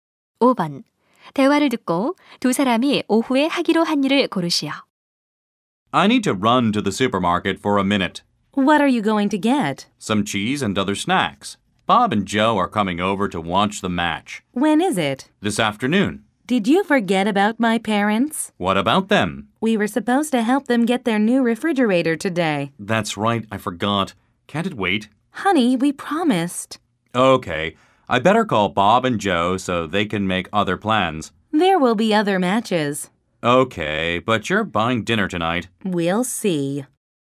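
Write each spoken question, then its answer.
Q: 대화를 듣고 두 사람이 오후에 하기로 한 일을 고르시오.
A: 부모님의 새 냉장고 들이는 일 돕기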